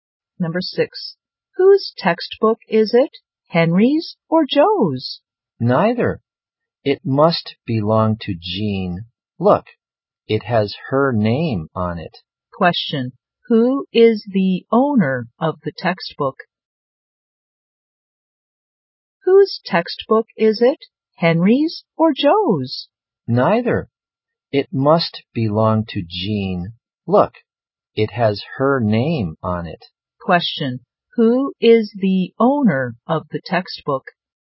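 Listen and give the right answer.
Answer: Jean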